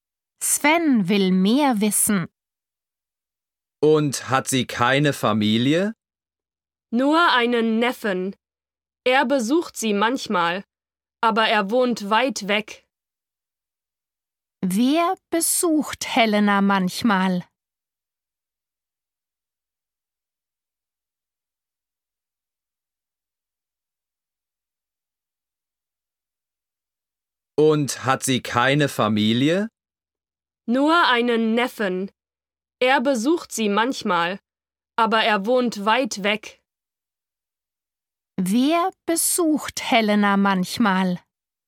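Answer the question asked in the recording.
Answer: ihr Neffe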